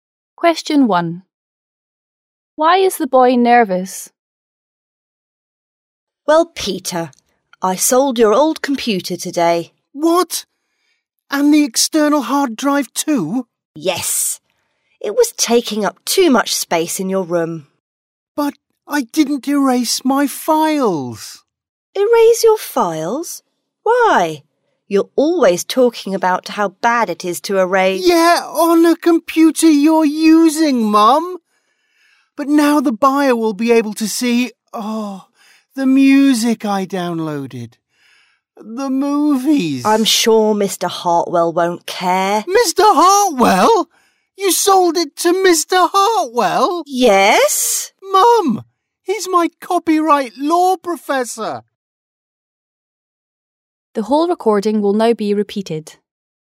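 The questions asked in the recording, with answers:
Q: Why is the boy nervous?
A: His mother sold his computer, with his downloaded music and movies still on it, to his copyright law professor.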